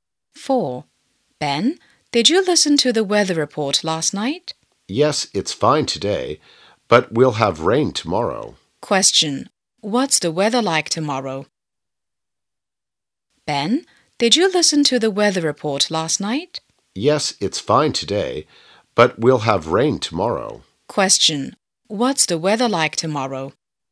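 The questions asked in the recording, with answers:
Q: What's the weather like tomorrow?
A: Rainy.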